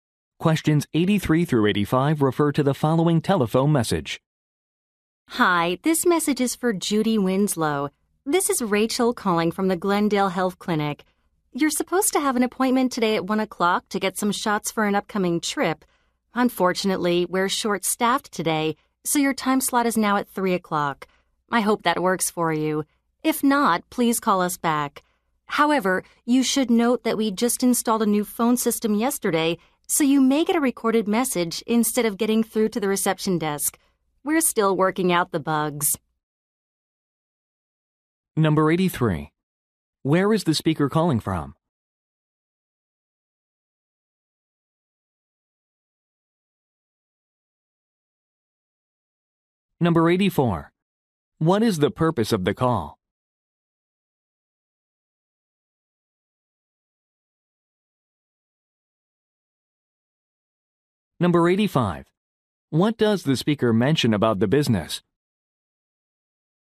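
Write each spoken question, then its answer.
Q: Where is the speaker calling from?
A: A health clinic

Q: What is the purpose of the call?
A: To change an appointment time

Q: What does the speaker mention about the business?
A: It installed a new phone system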